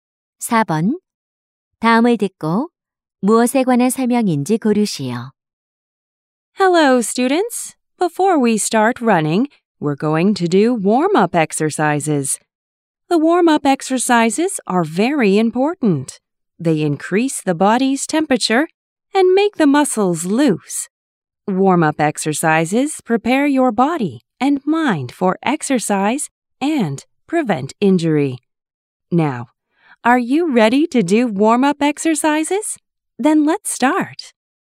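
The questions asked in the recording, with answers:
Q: 다음을 듣고 무엇에 관한 설명인지 고르시오.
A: 준비 운동의 중요성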